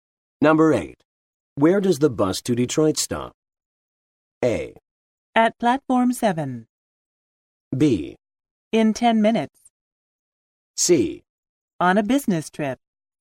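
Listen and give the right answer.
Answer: A: At platform 7.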